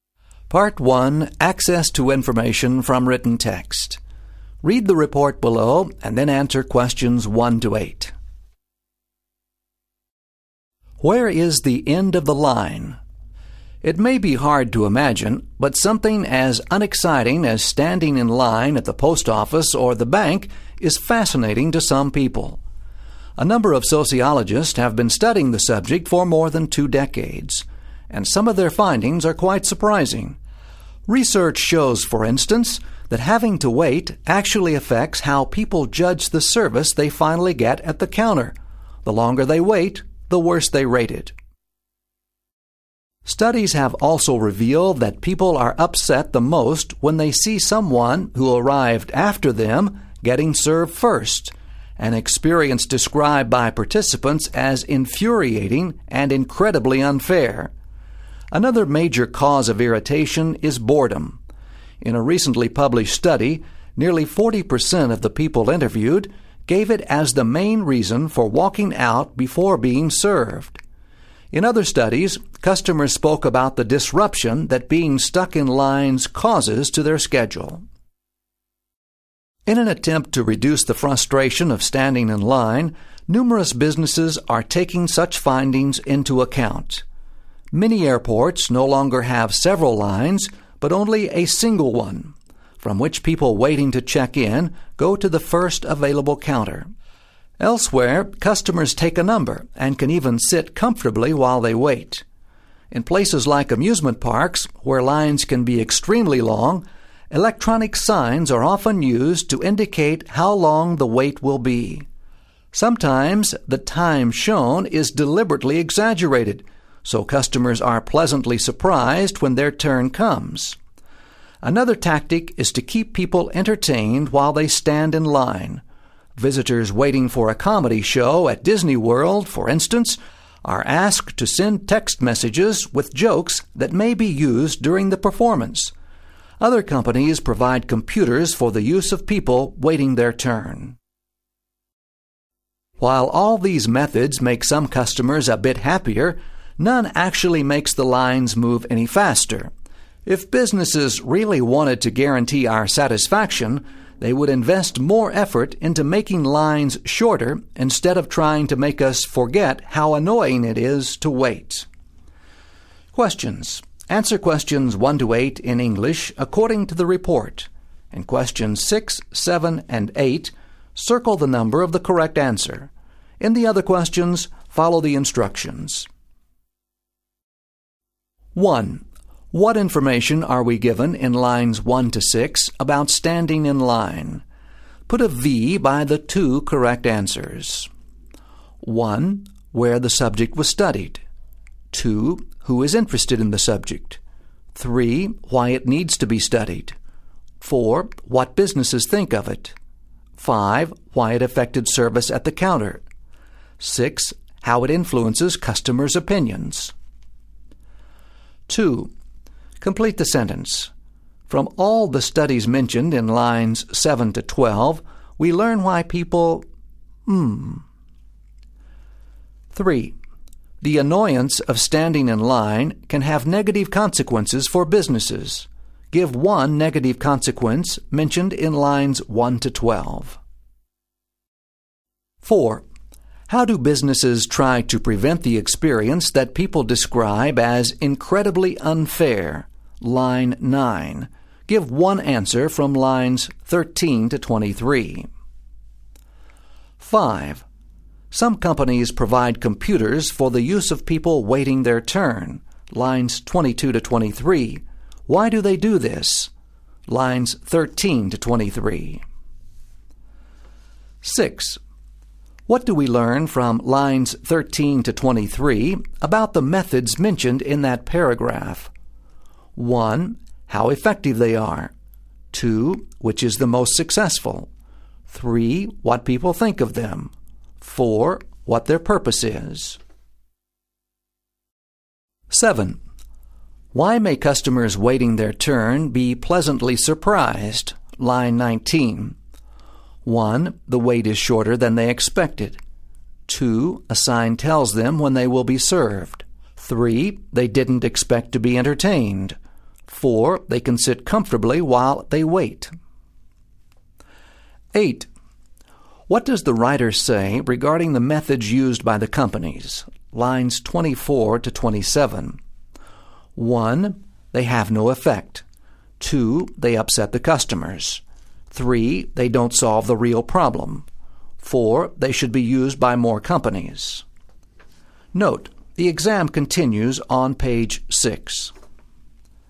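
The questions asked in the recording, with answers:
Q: What information are we given in lines 1 to 6 about standing in line?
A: 2: Who is interested in the subject; 6: How it influences customers' opinions

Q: Give one negative consequence mentioned in lines 1 to 12.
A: People walk out before being served / they rate the service worse

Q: How do businesses try to prevent the experience that people describe as incredibly unfair?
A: A single line to the first available counter / customers take a number

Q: Lines 22 to 23. Why do they do this?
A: To keep people entertained so they aren't bored

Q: Why may customers waiting their turn be pleasantly surprised?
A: 1: The wait is shorter than they expected.

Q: What does the writer say regarding the methods used by the companies?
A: 3: They don't solve the real problem.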